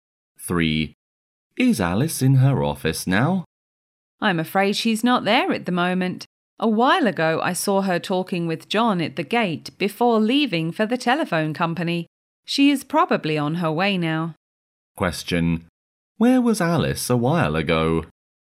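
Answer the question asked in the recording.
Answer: At the gate, talking with John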